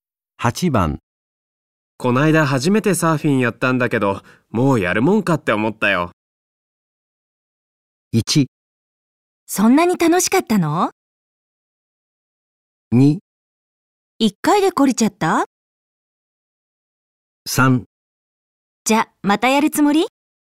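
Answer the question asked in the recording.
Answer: 2: 一回で懲りちゃった?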